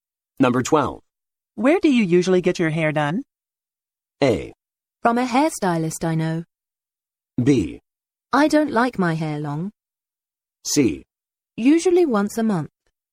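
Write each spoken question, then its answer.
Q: Where do you usually get your hair done?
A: A: From a hairstylist I know.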